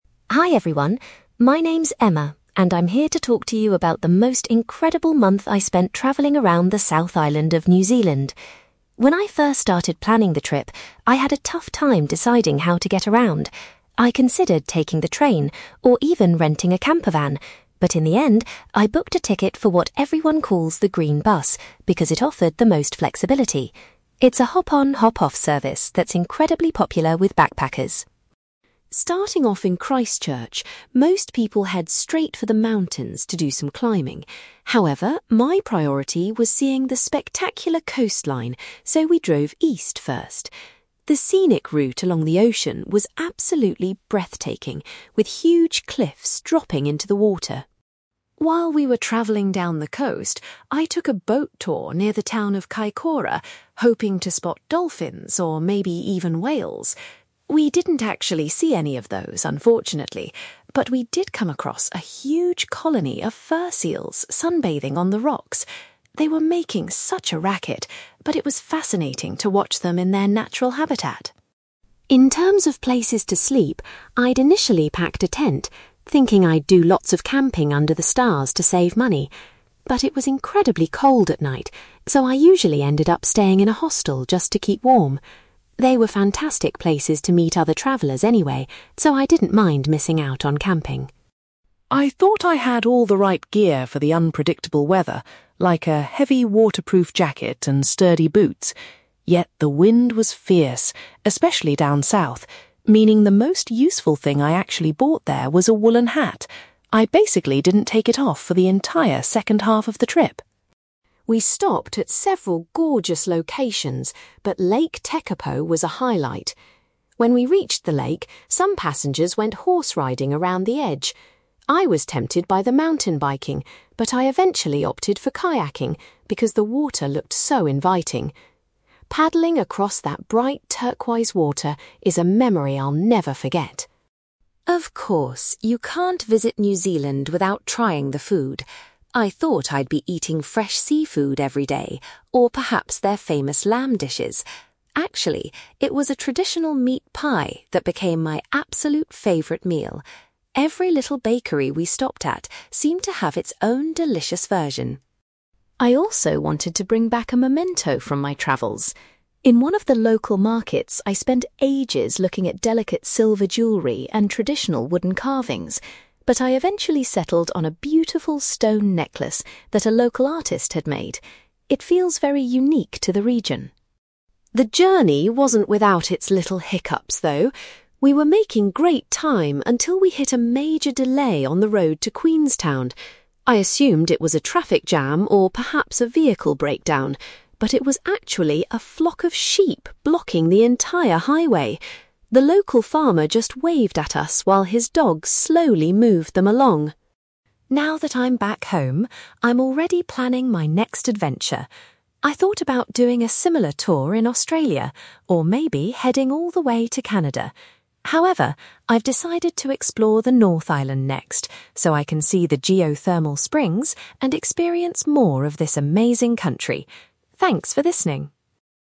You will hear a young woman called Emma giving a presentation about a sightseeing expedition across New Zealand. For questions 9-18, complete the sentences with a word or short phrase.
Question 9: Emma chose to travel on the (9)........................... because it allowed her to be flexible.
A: green bus

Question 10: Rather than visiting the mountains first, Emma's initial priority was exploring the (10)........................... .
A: coastline

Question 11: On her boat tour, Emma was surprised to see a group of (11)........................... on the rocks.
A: fur seals

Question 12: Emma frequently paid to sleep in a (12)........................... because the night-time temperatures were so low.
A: hostel

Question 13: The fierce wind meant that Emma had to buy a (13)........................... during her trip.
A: woollen hat

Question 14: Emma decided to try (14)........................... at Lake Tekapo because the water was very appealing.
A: kayaking

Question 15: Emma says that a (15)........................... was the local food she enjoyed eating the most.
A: meat pie

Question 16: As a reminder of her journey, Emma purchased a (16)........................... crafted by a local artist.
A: stone necklace

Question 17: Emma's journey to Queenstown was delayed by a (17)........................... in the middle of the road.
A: flock of sheep

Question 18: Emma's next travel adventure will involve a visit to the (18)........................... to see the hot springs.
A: North Island

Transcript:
Emma: Hi everyone, my name is Emma, and I'm here to talk to you about the most incredible month I spent travelling around the South Island of New Zealand. When I first started planning the trip, I had a tough time deciding how to get around. I considered taking the train, or even renting a campervan, but in the end, I booked a ticket for what everyone calls the green bus, because it offered the most flexibility. It's a hop-on, hop-off service that's incredibly popular with backpackers.
Starting off in Christchurch, most people head straight for the mountains to do some climbing. However, my priority was seeing the spectacular coastline, so we drove east first. The scenic route along the ocean was absolutely breathtaking, with huge cliffs dropping into the water.
While we were travelling down the coast, I took a boat tour near the town of Kaikoura, hoping to spot dolphins or maybe even whales. We didn't actually see any of those, unfortunately, but we did come across a huge colony of fur seals sunbathing on the rocks. They were making such a racket, but it was fascinating to watch them in their natural habitat.
In terms of places to sleep, I'd initially packed a tent, thinking I'd do lots of camping under the stars to save money. But it was incredibly cold at night, so I usually ended up staying in a hostel just to keep warm. They were fantastic places to meet other travellers anyway, so I didn't mind missing out on camping.
I thought I had all the right gear for the unpredictable weather, like a heavy waterproof jacket and sturdy boots. Yet, the wind was fierce, especially down south, meaning the most useful thing I actually bought there was a woollen hat. I basically didn't take it off for the entire second half of the trip!
We stopped at several gorgeous locations, but Lake Tekapo was a highlight. When we reached the lake, some passengers went horse riding around the edge. I was tempted by the mountain biking, but I eventually opted for kayaking because the water looked so inviting. Paddling across that bright turquoise water is a memory I'll never forget.
Of course, you can't visit New Zealand without trying the food. I thought I'd be eating fresh seafood every day, or perhaps their famous lamb dishes. Actually, it was a traditional meat pie that became my absolute favourite meal. Every little bakery we stopped at seemed to have its own delicious version!
I also wanted to bring back a memento from my travels. In one of the local markets, I spent ages looking at delicate silver jewellery and traditional wooden carvings, but I eventually settled on a beautiful stone necklace that a local artist had made. It feels very unique to the region.
The journey wasn't without its little hiccups, though. We were making great time until we hit a major delay on the road to Queenstown. I assumed it was a traffic jam or perhaps a vehicle breakdown, but it was actually a flock of sheep blocking the entire highway! The local farmer just waved at us while his dogs slowly moved them along.
Now that I'm back home, I'm already planning my next adventure. I thought about doing a similar tour in Australia, or maybe heading all the way to Canada. However, I've decided to explore the North Island next, so I can see the geothermal springs and experience more of this amazing country. Thanks for listening!

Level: B2